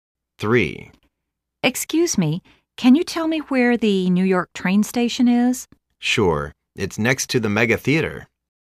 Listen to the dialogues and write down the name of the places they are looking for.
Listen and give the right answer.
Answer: NY Train Station